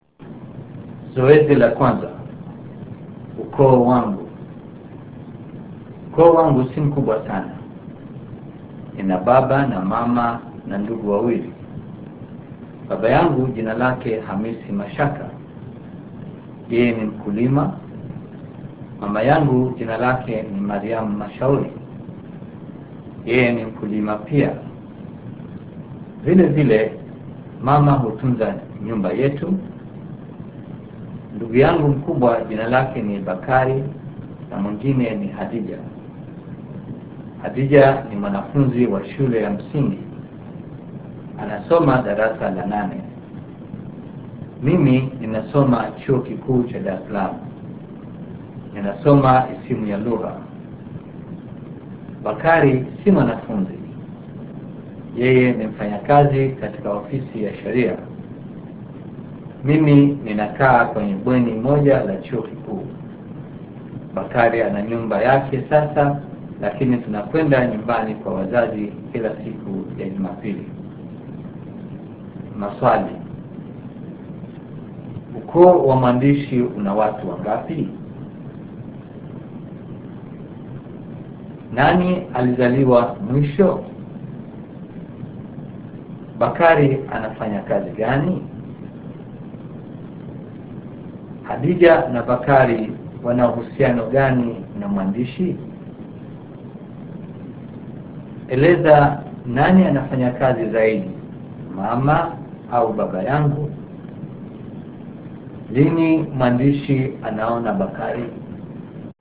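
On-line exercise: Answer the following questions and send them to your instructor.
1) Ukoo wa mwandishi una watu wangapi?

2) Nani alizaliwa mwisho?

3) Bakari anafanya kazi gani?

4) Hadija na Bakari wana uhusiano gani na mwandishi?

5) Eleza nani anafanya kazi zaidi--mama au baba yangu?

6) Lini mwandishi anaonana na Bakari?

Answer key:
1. Watu watano
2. Hadija
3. Ni mfanyakazi katika ofisi ya sheria
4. Ni ndugu zake
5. Mama, kwa sababu ni mkulima na pia hutunza nyumba
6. Kila siku ya Jumapili nyumbani kwa wazazi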